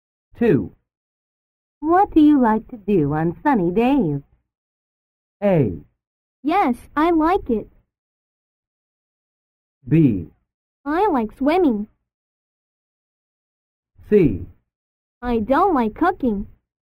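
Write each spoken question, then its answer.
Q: What do you like to do on sunny days?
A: B: I like swimming.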